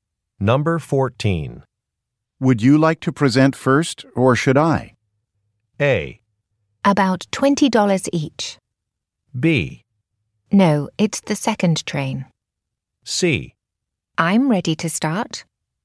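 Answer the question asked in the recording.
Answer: C: I'm ready to start.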